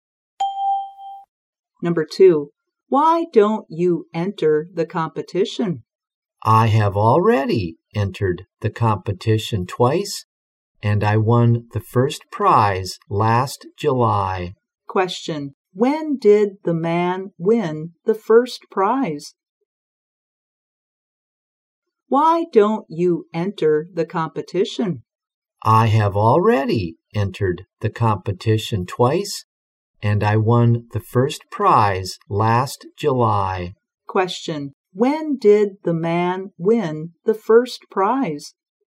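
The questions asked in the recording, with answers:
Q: When did the man win the first prize?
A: Last July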